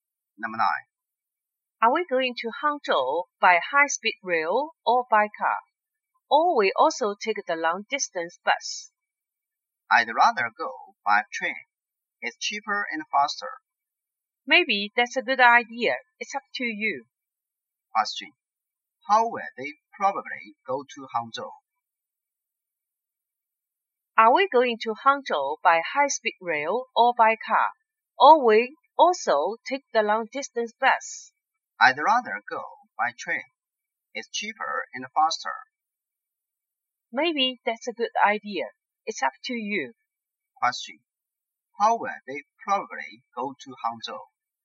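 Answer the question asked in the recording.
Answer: By high-speed rail (train)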